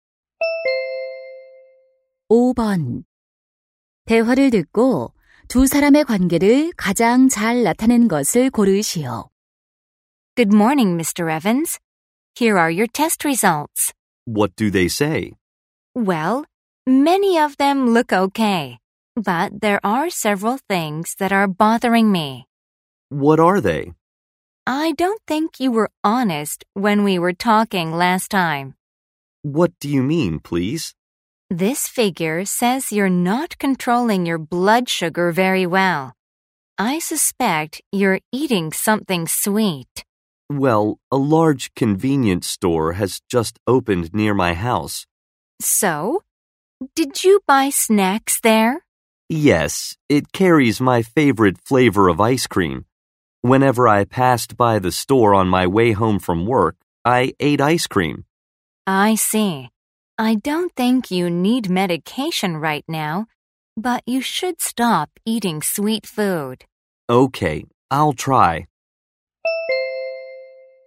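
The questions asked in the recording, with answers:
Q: 대화를 듣고 두 사람의 관계를 가장 잘 나타낸 것을 고르시오.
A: 의사 - 환자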